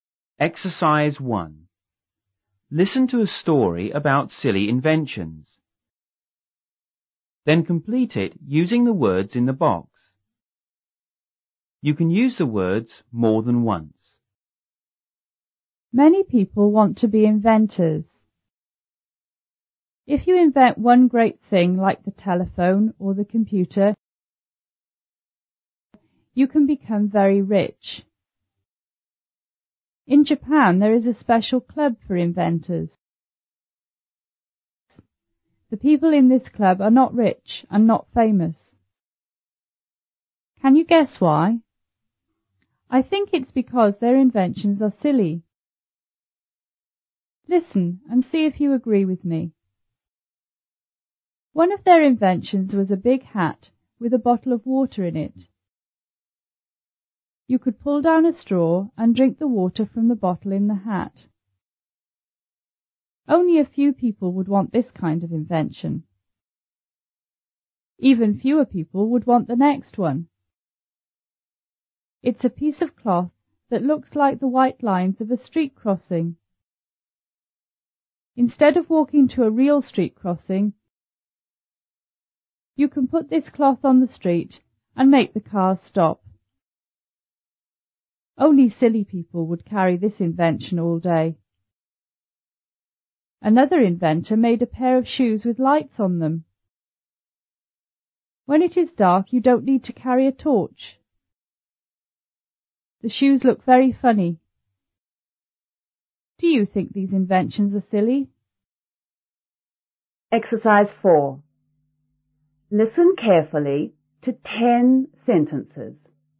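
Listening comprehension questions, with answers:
Then complete it using the words in the box.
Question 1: Many people want to be __.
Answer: inventors

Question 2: If you __ one great thing,like the telephone or the computer,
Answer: invent

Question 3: In Japan,there is a special club for _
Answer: inventors

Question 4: Can you __ why?I think,it's because their __ are silly!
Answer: guess; inventions

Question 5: Listen and see if you __ with me.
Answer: agree

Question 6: One of their __ was a big hat with a bottle of water in it.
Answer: inventions

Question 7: Only a __ people would want this kind of invention.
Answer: few

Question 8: Even __ people would want the next one.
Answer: fewer

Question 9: _ of walking to a real street crossing,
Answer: Instead

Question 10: Only silly people would carry this _ all day!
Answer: invention

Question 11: Another _ made a pair of shes with lights on them.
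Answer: inventor

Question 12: Do you think these _ are sill?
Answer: inventions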